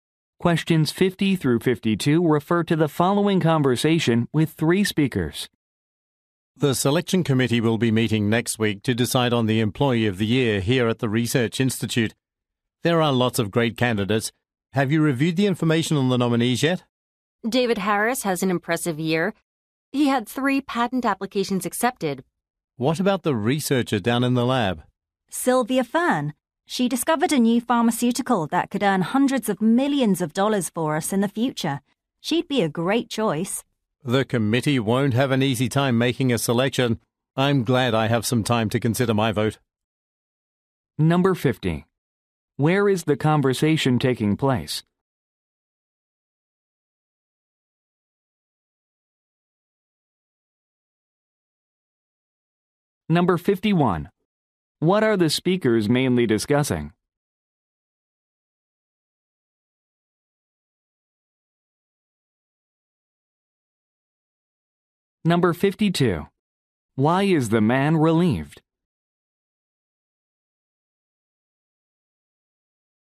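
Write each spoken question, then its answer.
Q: Where is the conversation taking place?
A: At a research institute

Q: What are the speakers mainly discussing?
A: Candidates for Employee of the Year

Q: Why is the man relieved?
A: He has time to consider his vote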